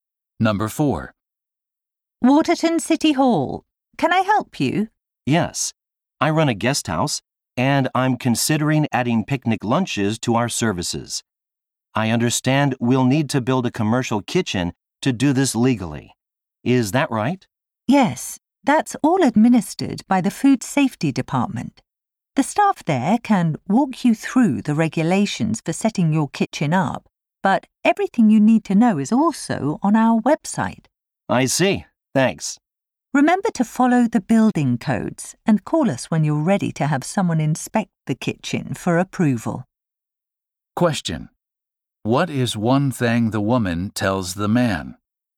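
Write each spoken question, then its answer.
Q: What is one thing the woman tells the man?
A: He should call the city when the kitchen is ready to be inspected for approval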